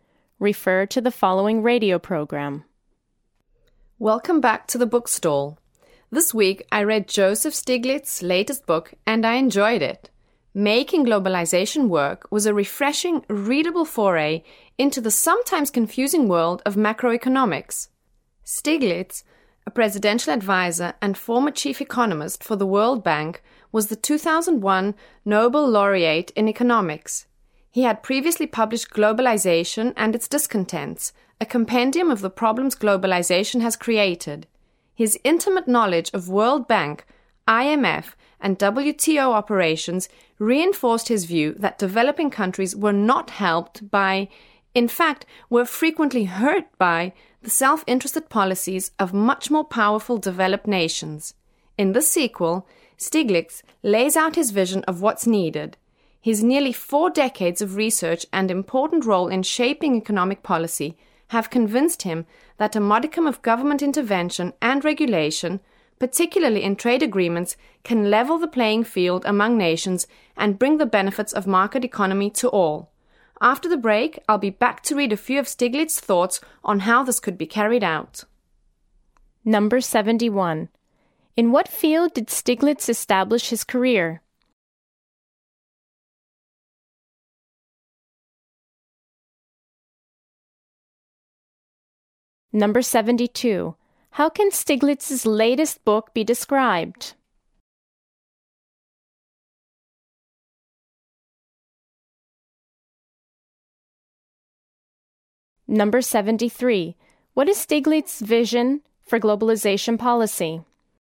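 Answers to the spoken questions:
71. Economics
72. Refreshing and readable
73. Some government intervention and regulation, especially in trade agreements, to level the playing field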